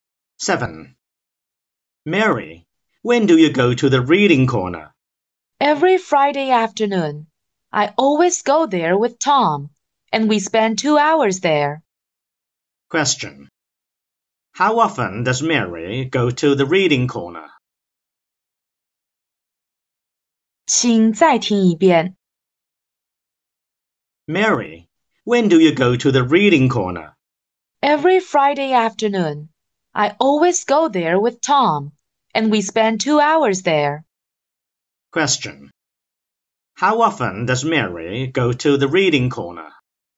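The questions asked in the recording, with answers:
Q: How often does Mary go to the reading corner?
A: Once a week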